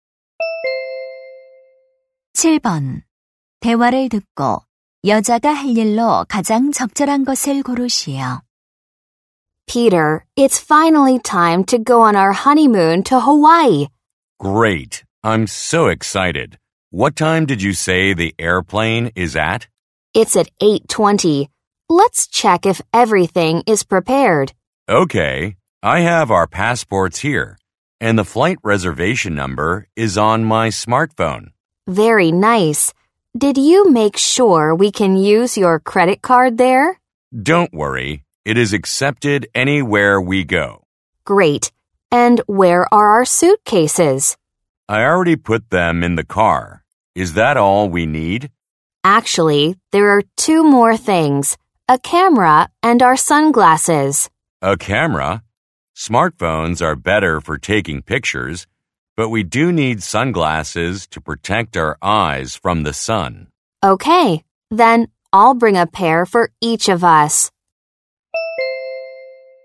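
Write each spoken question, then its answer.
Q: 대화를 듣고 여자가 할 일로 가장 적절한 것을 고르시오.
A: 선글라스 챙기기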